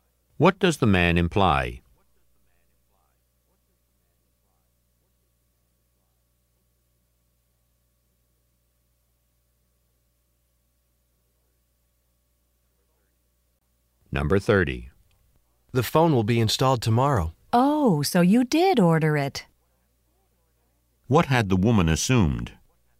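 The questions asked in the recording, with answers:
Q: What had the woman assumed?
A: That the man hadn't ordered the phone.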